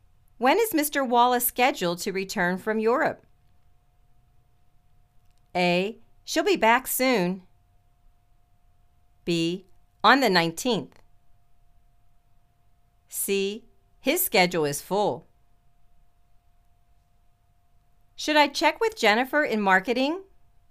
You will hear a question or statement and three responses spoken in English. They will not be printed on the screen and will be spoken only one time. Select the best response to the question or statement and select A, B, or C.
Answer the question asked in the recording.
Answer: On the 19th